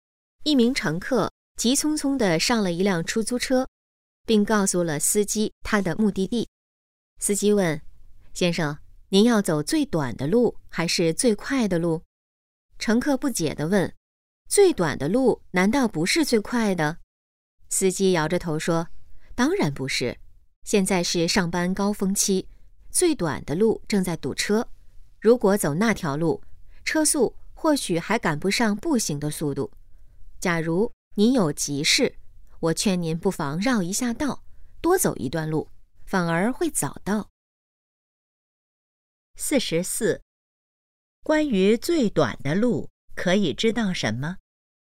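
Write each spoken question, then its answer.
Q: 关于最短的路,可以知道什么?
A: 正在堵车

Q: 司机建议怎么做?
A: 绕道走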